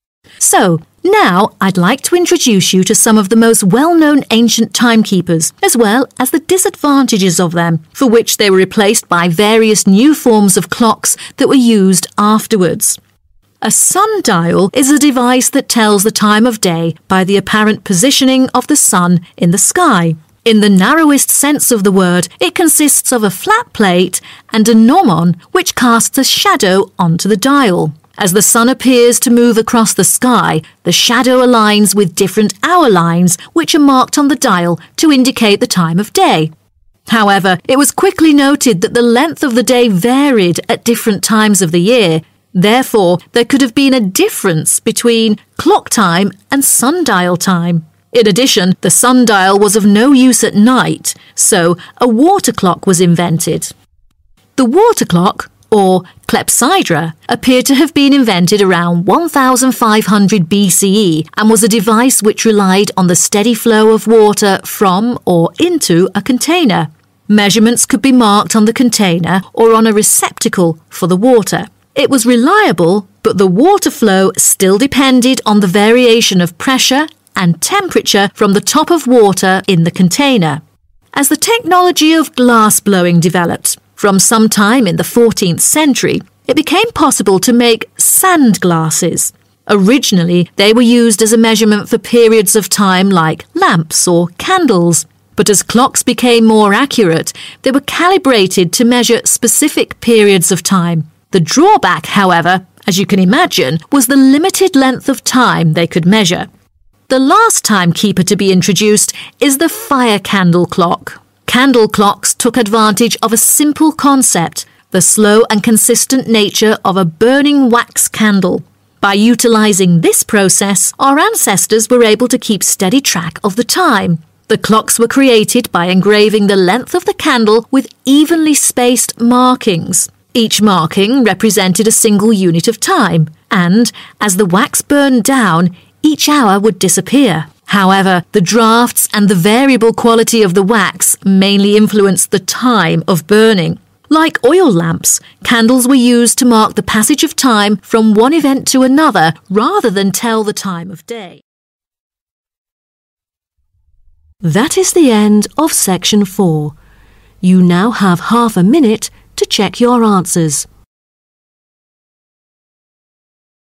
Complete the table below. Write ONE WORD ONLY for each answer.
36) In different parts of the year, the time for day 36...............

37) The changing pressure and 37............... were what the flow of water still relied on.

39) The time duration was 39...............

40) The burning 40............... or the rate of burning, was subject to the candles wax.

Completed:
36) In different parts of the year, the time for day varied
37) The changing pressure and temperature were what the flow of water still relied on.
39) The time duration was limited
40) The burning time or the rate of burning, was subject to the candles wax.